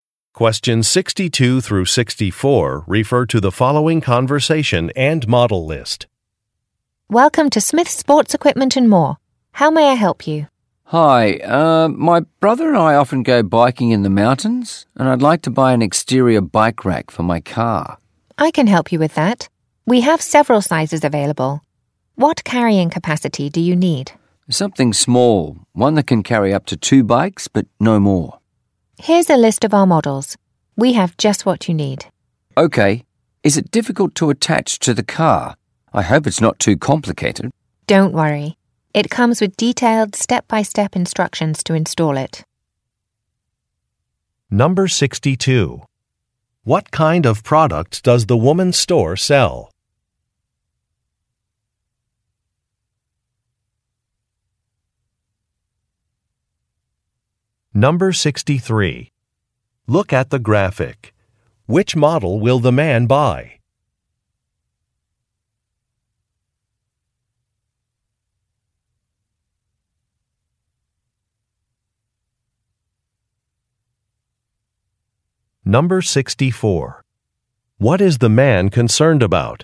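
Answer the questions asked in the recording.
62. Sports equipment
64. Whether the bike rack is difficult to attach to the car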